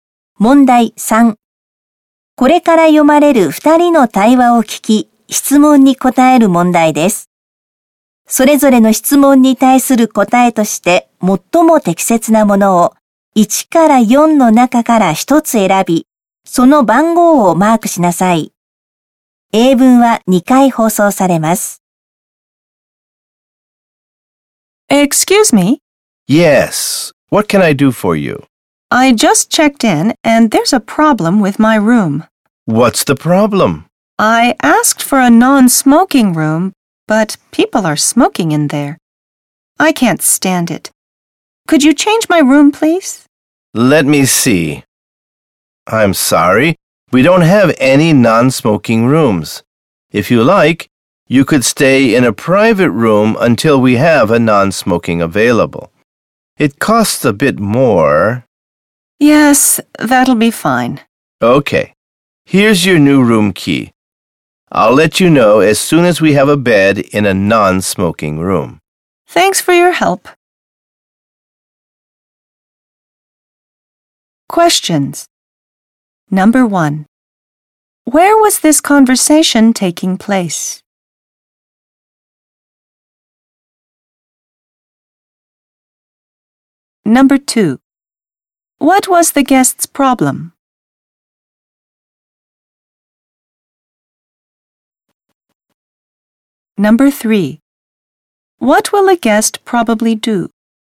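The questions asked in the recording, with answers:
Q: What was the guest's problem?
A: People were smoking in the room, though the guest had asked for a non-smoking room

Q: What will a guest probably do?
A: Stay in a private room, paying a bit more, until a non-smoking room is available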